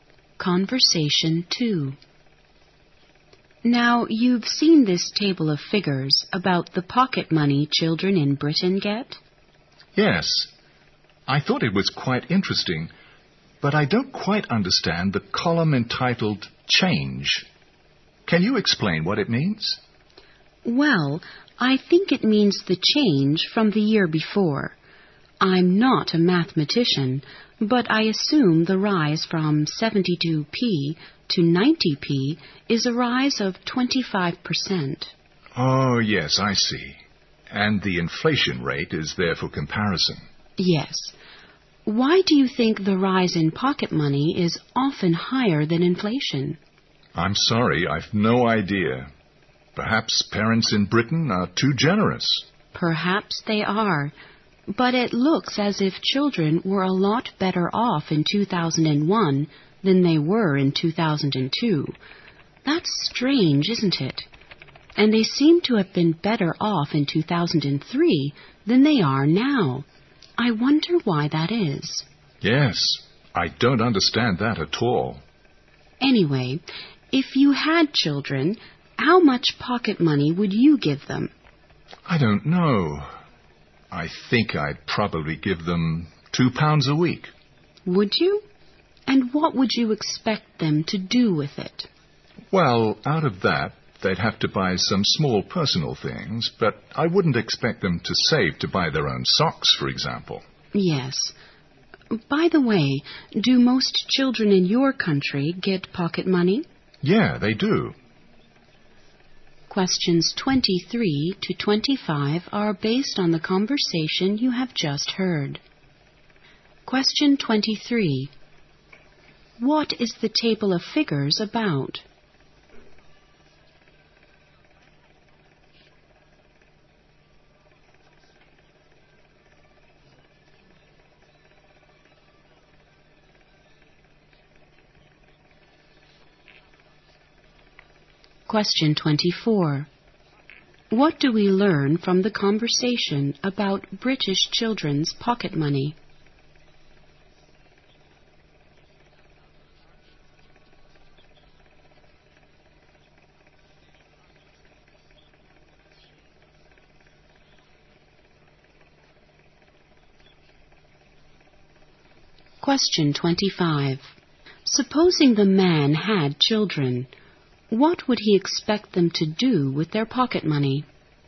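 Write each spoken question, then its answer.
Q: What is the table of figures about?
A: The pocket money children in Britain get

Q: Supposing the man had children, what would he expect them to do with their pocket money?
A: Buy small personal things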